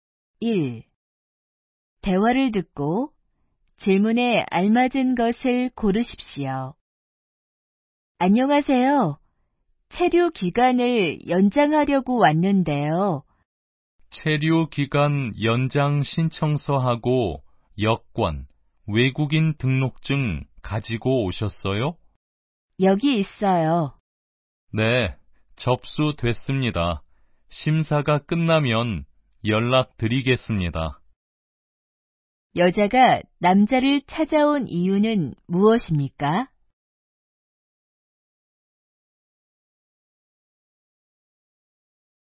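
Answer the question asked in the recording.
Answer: 체류 기간을 연장하려고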